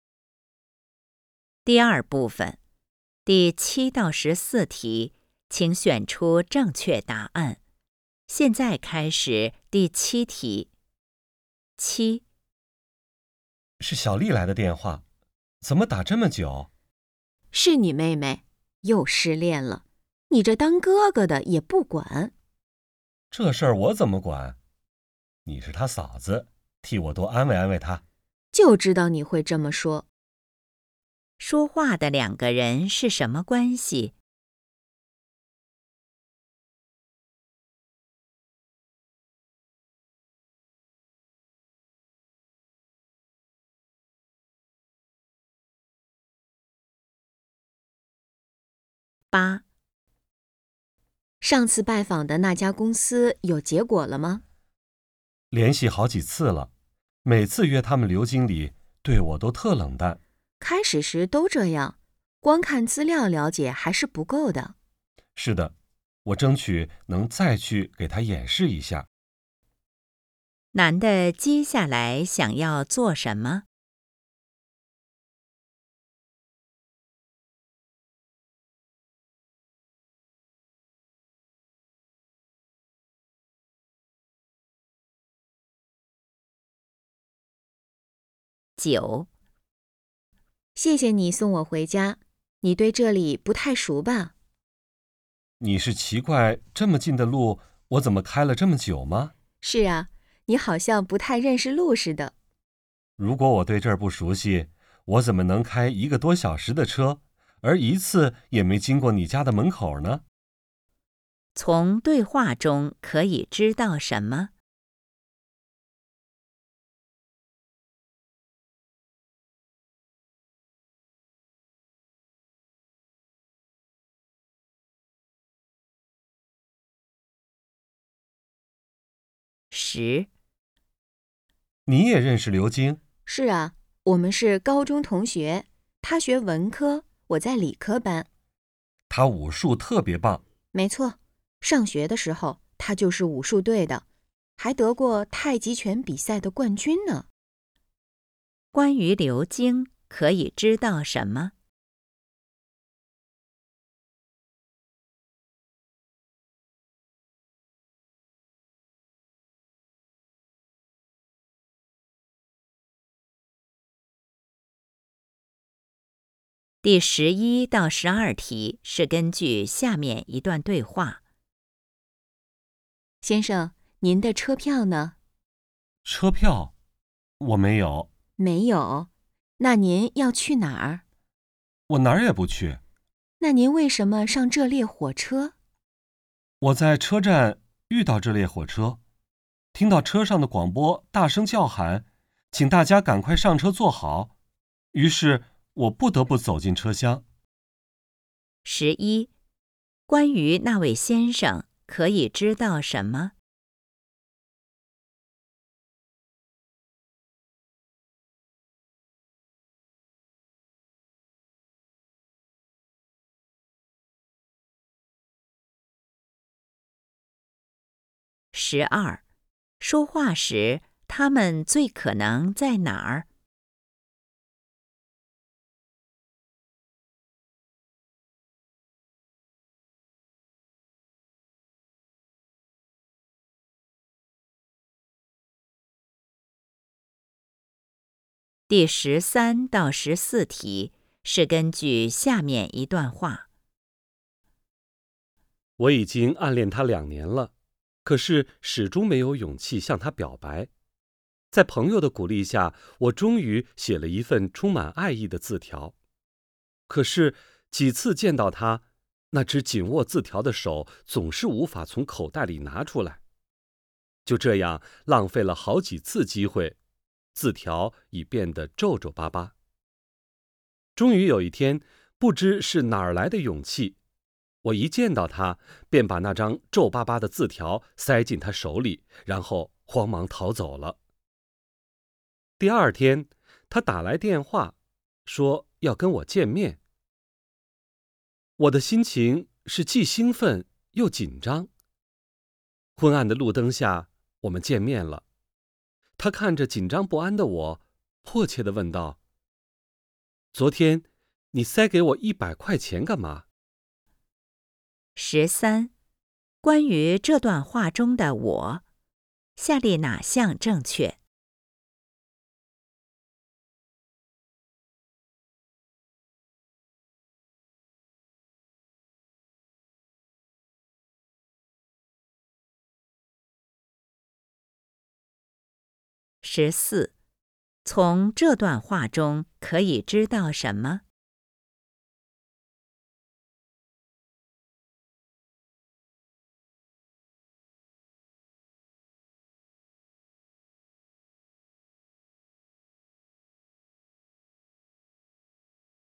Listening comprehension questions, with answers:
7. 说话的两个人是什么关系?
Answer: 夫妻

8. 男的接下来想要做什么?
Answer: 去演示产品

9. 从对话中可以知道什么?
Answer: 男的故意多绕路

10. 关于刘京, 可以知道什么?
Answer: 比赛得过冠军

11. 关于那位先生, 可以知道什么?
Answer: 有点儿糊涂

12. 说话时他们最可能在哪儿?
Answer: 车厢里面

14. 从这段话中可以知道什么?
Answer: "我"总是没勇气表白

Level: HSK 5